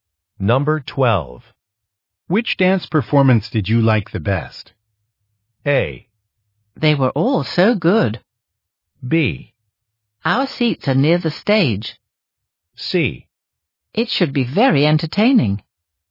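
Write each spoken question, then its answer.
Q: Which dance performance did you like the best?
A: A: They were all so good.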